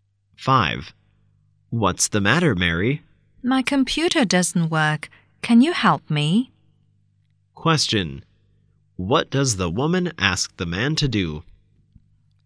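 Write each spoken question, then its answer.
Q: What does the woman ask the man to do?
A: Help her with her computer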